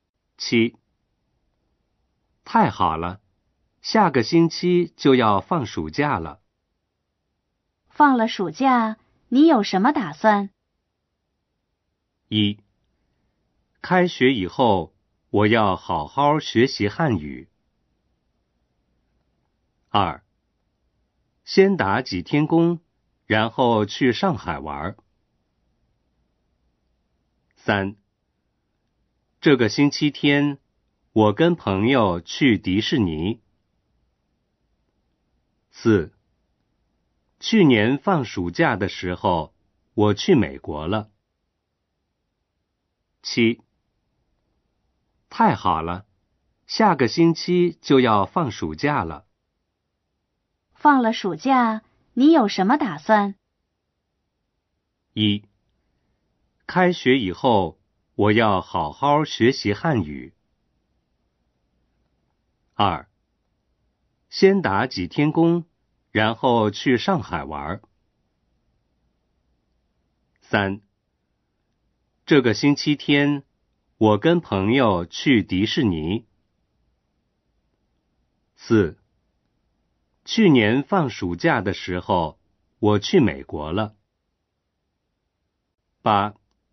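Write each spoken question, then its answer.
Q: 放了暑假,你有什么打算?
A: 二: 先打几天工,然后去上海玩。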